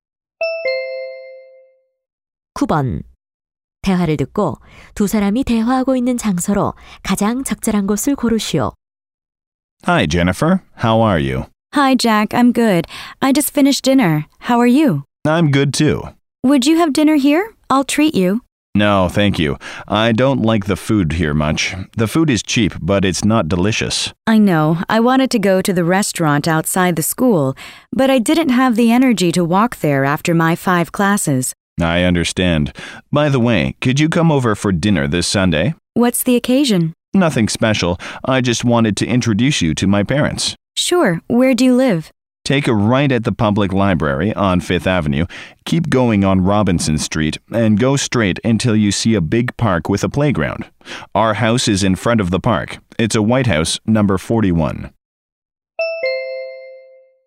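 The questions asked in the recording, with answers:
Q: 대화를 듣고 두 사람이 대화하고 있는 장소로 가장 적절한 곳을 고르시오.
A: 학교 식당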